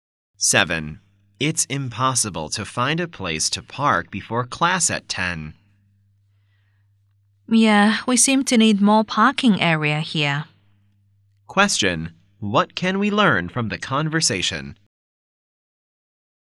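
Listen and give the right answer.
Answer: It is hard to find a parking place; more parking is needed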